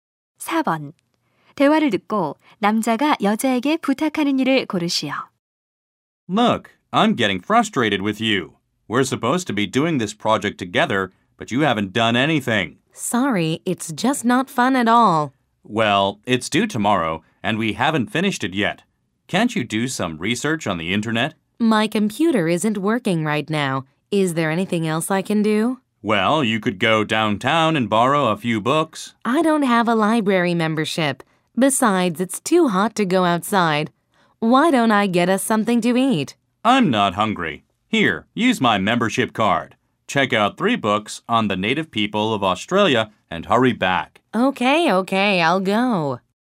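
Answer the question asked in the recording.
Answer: 도서관에서 책 3권 빌려 오기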